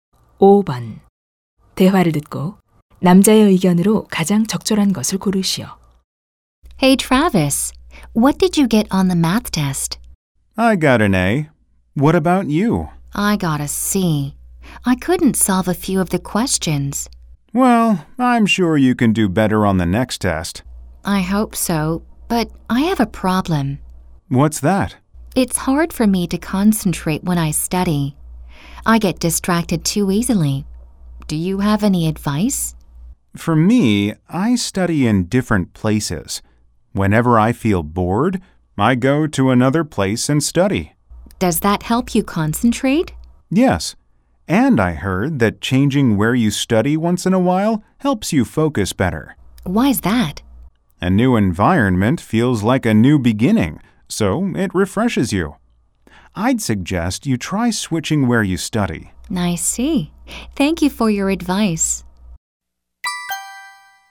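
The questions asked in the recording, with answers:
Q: 대화를 듣고 남자의 의견으로 가장 적절한 것을 고르시오.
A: 공부 장소를 가끔 바꾸면 집중에 도움이 된다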